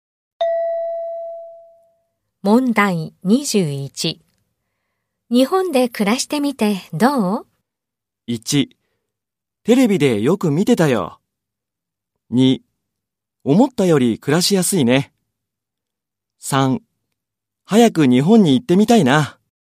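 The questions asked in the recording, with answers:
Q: 日本で暮らしてみてどう?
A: 2: 思ったより暮らしやすいね。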